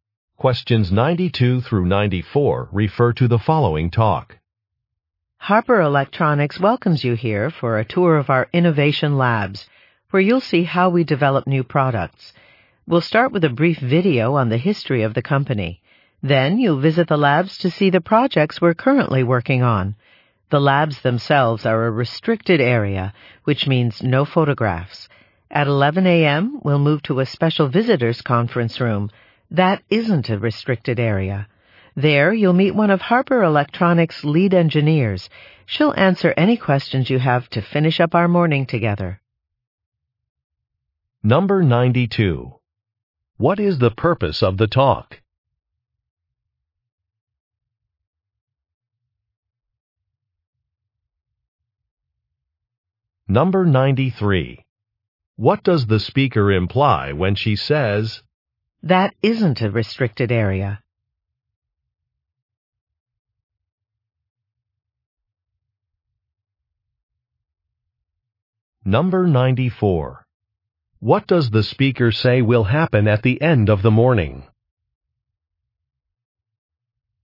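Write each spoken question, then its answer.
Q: What is the purpose of the talk?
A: To describe the tour schedule

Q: What does the speaker say will happen at the end of the morning?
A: A lead engineer will answer questions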